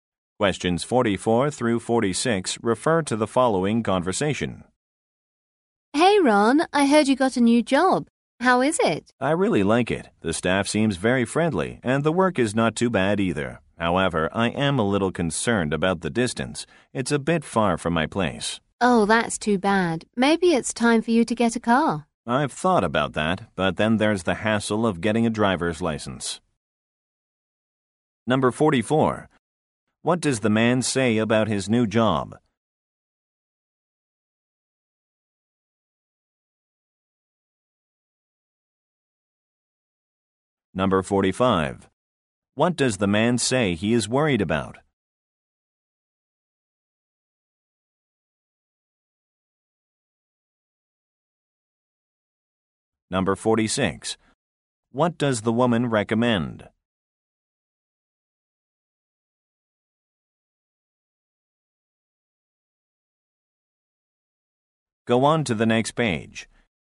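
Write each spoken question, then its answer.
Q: What does the man say about his new job?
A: The staff is friendly and the work is not too bad.

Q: What does the man say he is worried about?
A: The distance from his home

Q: What does the woman recommend?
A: Getting a car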